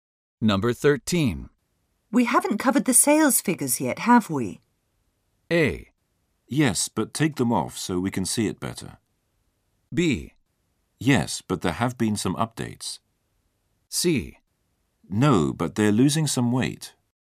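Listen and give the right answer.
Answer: B: Yes, but there have been some updates.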